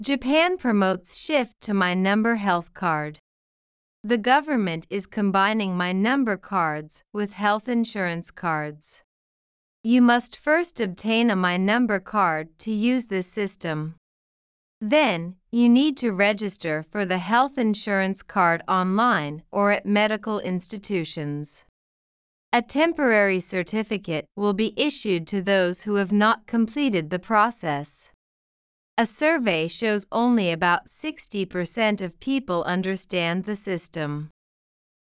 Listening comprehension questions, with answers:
次の各質問の答えを探しながら聞きましょう。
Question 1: Who is promoting the shift to the My Number Health Card?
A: The government is promoting it.

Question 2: What must people do first to use the My Number Health Card?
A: They need to get a My Number card.

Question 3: How can people register for the My Number Health Card?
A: They can do it online or at medical institutions.

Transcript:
Japan Promotes Shift to My Number Health Card
The government is combining My Number cards with health insurance cards.
You must first obtain a My Number card to use this system.
Then, you need to register for the health insurance card online or at medical institutions.
A temporary certificate will be issued to those who have not completed the process.
A survey shows only about 60 percent of people understand the system.

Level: 中級脱出